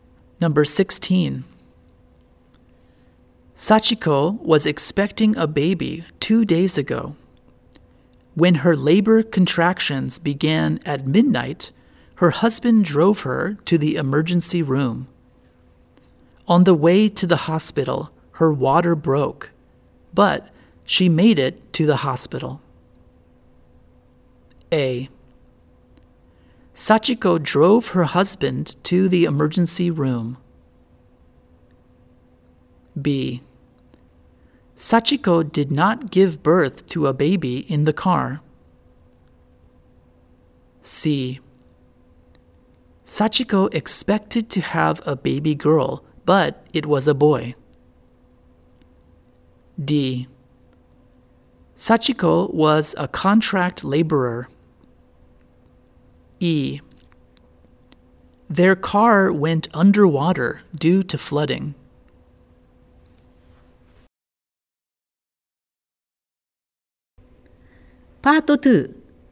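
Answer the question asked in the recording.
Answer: B: Sachiko did not give birth to a baby in the car.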